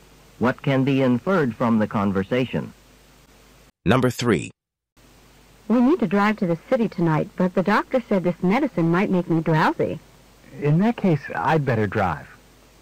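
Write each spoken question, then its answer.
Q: What does the man think the woman should do?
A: Let him drive to the city.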